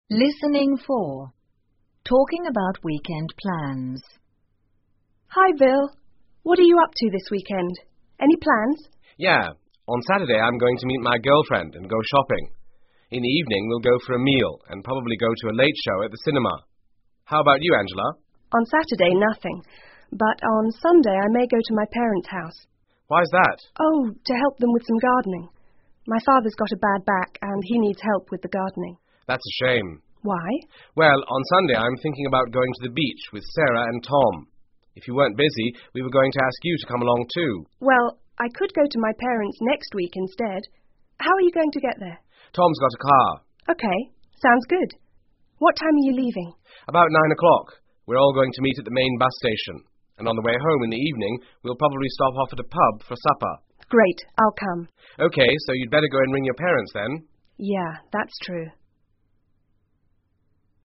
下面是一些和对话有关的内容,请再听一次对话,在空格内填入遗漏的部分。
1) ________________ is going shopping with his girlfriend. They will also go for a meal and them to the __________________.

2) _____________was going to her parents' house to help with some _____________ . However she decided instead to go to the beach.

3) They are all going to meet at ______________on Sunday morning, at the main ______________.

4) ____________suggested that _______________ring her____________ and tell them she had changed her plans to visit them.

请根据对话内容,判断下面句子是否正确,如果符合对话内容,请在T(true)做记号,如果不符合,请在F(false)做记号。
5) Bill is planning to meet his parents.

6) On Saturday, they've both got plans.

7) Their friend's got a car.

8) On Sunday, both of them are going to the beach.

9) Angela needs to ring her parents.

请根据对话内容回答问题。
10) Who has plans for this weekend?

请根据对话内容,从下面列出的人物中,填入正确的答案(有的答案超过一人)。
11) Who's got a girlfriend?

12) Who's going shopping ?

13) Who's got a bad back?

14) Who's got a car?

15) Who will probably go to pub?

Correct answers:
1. Bill, cinema
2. Angela, gardening
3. 9:00, bus station
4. Bill, Angela, parents
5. F
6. F
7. T
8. T
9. T
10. Both Angela and Bill
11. Bill
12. Bill and Bill's girlfriend
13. Angela's father
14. Tom
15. Bill,Angela,Sarah and Tom

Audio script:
Listening 4 Talking About Weekend Plans讨论周末的计划
Angela: Hi, Bill. What are you up to this weekend? Any plans?
Bill: Yeah. On Saturday, I'm going to meet my girlfriend and go shopping. In the evening, we'll go for a meal and probably go to a late show at the cinema. How about you, Angela?
A: On Saturday, nothing. But on Sunday, I may go to my parents' house.
A: Oh...to help them with some gardening. My father's got a bad back and he needs help with the gardening.
B: That's a shame.
A: Why?
B: Well, on Sunday, I'm thinking about going to the beach with Sarah and Tom. If you weren't busy, we were going to ask you to come along, too.
A: Well,I could go to my parents' next week instead. How are you going to get there?
B: Tom's got a car.
A: OK.Sounds good. What time are you leaving?
B: About 9:00.We is all going to meet at the main bus station. And on the way home in the evening, we'll probably stop off at a pub for supper.
A: Great, I'll come.
B: OK.So you'd better go and ring your parents then.
A: Yeah.That's true.